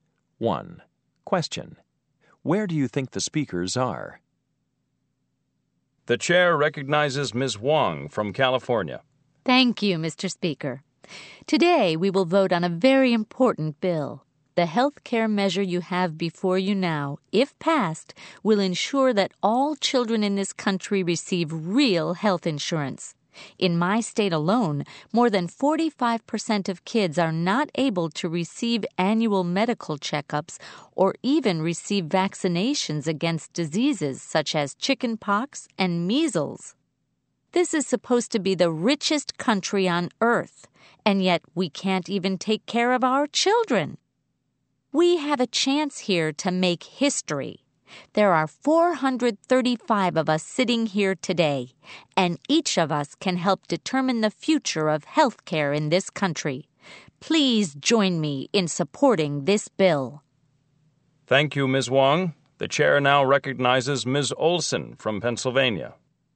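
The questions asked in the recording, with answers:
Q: Where do you think the speakers are?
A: In the U.S. House of Representatives (Congress)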